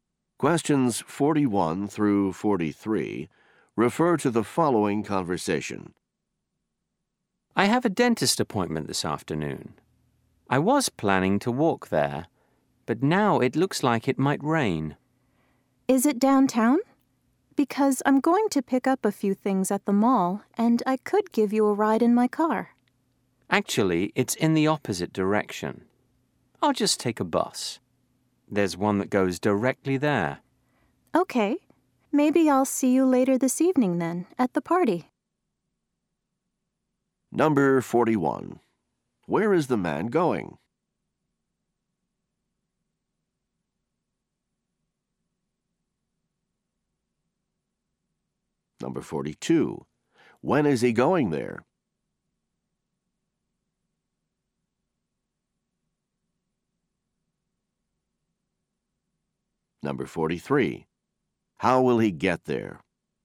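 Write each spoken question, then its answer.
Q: Where is the man going?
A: To the dentist

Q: When is he going there?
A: This afternoon

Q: How will he get there?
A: By bus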